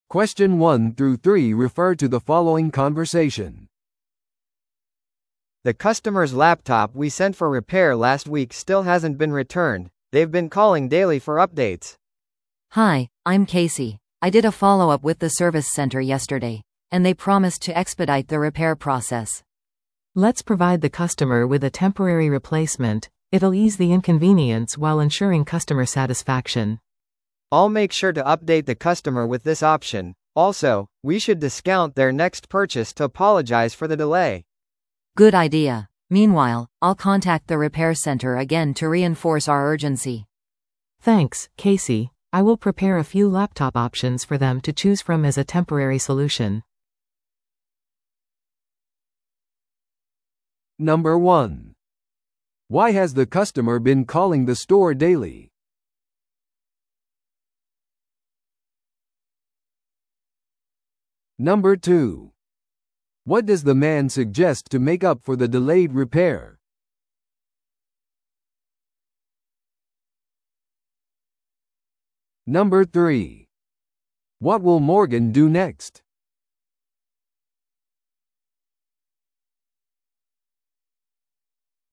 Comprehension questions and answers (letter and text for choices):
Listen to the audio below and answer the questions.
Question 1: Why has the customer been calling the store daily?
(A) 購入商品の払い戻しを得るため。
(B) 修理の状態を確認するため。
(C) 新しいラップトップモデルを予約するため。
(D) 商品の交換を要求するため。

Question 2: What does the man suggest to make up for the delayed repair?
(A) 全額返金する。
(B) 技術サポートを提供する。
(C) 将来の購入に割引を与える。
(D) 保証期間を延長する。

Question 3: What will Morgan do next?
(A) 修理のためサービスセンターを準備する。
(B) 顧客に個人的に割引を提供する。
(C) 緊急性を強調するためにサービスセンターに連絡を取る。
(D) 顧客のために恒久的なラップトップを選ぶ。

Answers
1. (B) 修理の状態を確認するため。
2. (C) 将来の購入に割引を与える。
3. (C) 緊急性を強調するためにサービスセンターに連絡を取る。

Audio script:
A: The customer's laptop we sent for repair last week still hasn't been returned. They've been calling daily for updates.
B: Hi, I'm Casey. I did a follow-up with the service center yesterday, and they promised to expedite the repair process.
C: Let's provide the customer with a temporary replacement. It'll ease the inconvenience while ensuring customer satisfaction.
A: I'll make sure to update the customer with this option. Also, we should discount their next purchase to apologize for the delay.
B: Good idea. Meanwhile, I'll contact the repair center again to reinforce our urgency.
C: Thanks, Casey. I will prepare a few laptop options for them to choose from as a temporary solution.